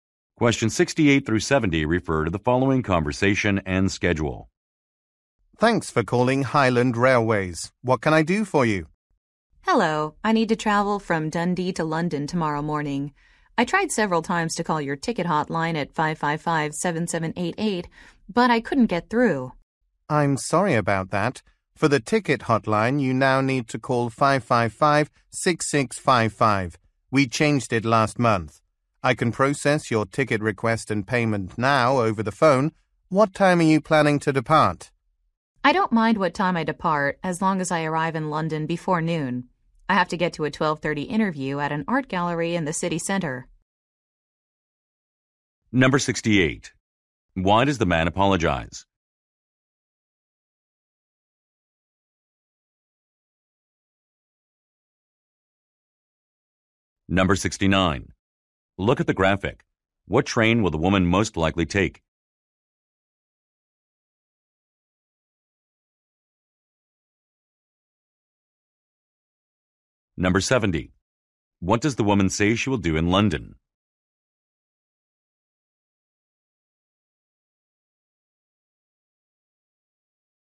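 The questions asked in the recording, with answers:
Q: Why does the man apologize?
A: The ticket hotline number changed.

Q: What does the woman say she will do in London?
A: Go to an interview at an art gallery.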